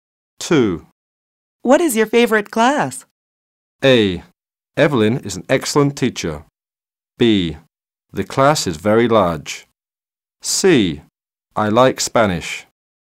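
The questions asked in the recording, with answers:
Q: What is your favorite class?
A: C: I like Spanish.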